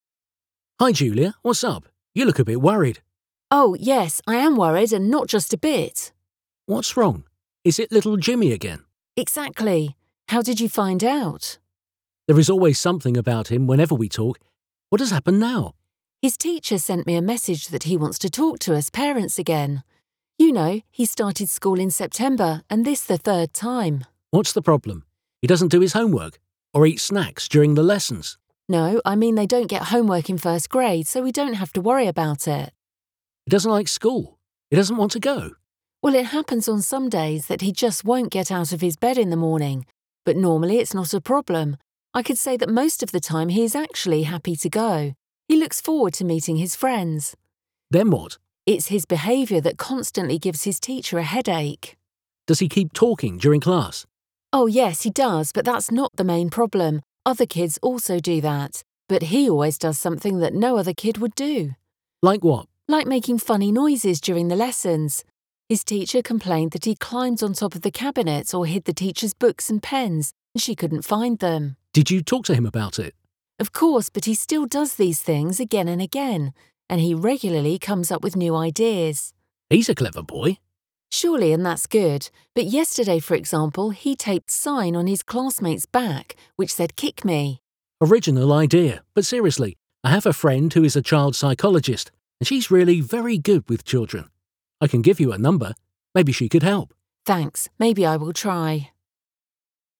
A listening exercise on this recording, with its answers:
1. Milyen üzenetet kapott Julia?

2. Mióta jár Jimmy iskolába?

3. Mit hallunk a házi feladatokról?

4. Mi történik időnként reggel?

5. Minek szokott várni a fiú?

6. Mi a helyzet az óra alatti beszélgetéssel?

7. Mit szokott még csinálni óra alatt?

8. Milyen dolgokra panaszkodott a tanítója?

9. Mit csinált Jimmy tegnap?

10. Mit javasol Rob?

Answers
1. A kisfia tanára szeretne beszélgetni a szülőkkel.
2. Szeptember óta.
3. Nincs az első osztályban.
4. Jimmy nem akar felkelni az ágyból.
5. Azt, hogy a barátaival találkozzon.
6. Nem ez a fő probléma. A többi gyerek is beszélget.
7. Furcsa zajokat csinálni.
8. Felmászott a szekrény tetejére. Eldugta a könyveit és a tollait.
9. Cédulákat ragasztott az osztálytársai hátára, hogy „rúgj belém."
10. Beszéljen a barátjával, aki gyerekpszichológus.

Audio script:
Rob: Hi, Julia, what's up? You look a bit worried.
Julia: Oh. yes. I am worried and not just a bit.
R: What's wrong? Is it little Jimmy again?
J: Exactly. How did you find out?
R: There is always something about him whenever we talk. What has happened now?
J: His teacher sent me a message that he wants to talk to us, parents again. You know, he started school in September and this the third time.
R: What's the problem? He doesn't do his homework? Or eats snacks during the lessons?
J: No, I mean they don't get homework in first grade so we don't have to worry about it.
R: He doesn't like school? He doesn't want to go?
J: Well, it happens on some days that he just won't get out of his bed in the morning but normally it's not a problem, I could say that most of the time he is actually happy to go. He looks forward to meeting his friends.
R: Then what?
J: It's his behaviour that constantly gives his teacher a headache.
R: Does he keep talking during class?
J: Oh, yes, he does but that's not the main problem. Other kids also do that. But he always does something that no other kid would do.
R: Like what?
J: Like making funny noises during the lessons. His teacher complained that he climbed on top of the cabinet or hid the teacher's books and pens and she couldn't find them.
R: Did you talk to him about it?
J: Of course, but he still does these things again and again. And he regularly comes up with new ideas.
R: He's a clever boy.
J: Surely and that's good. But yesterday, for example, he taped sign on his classmates' back, which said "Kick me".
R: Original idea. But seriously. I have a friend who is a child psychologist and she's really very good with children. I can give you her number. Maybe she could help.
J: Thanks. maybe I will try.

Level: ALAPFOK (B1)